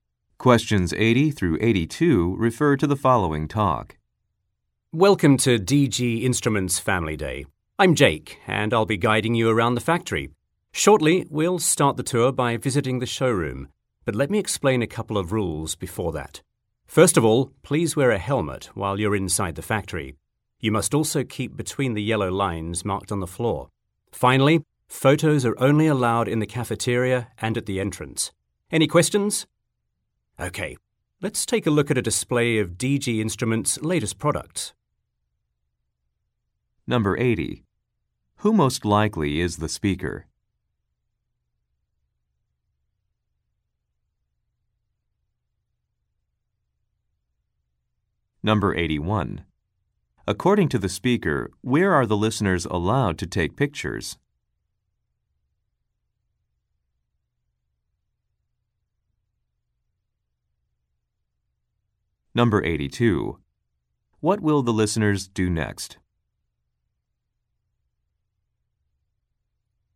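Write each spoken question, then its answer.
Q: Who most likely is the speaker?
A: A factory tour guide

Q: According to the speaker, where are the listeners allowed to take pictures?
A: In the cafeteria and at the entrance

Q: What will the listeners do next?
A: Visit the showroom to see the latest products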